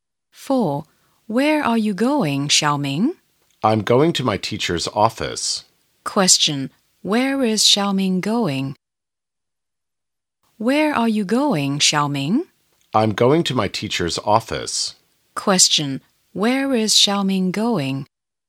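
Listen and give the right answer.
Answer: To his teacher's office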